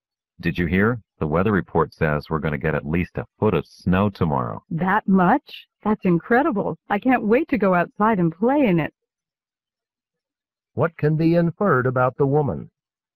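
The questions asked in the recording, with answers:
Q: What can be inferred about the woman?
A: She is excited about the snow and wants to play in it.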